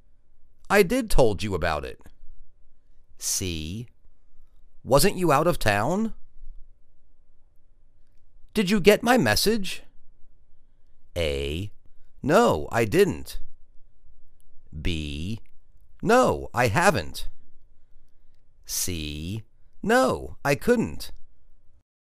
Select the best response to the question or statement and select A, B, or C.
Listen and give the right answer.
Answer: No, I didn't.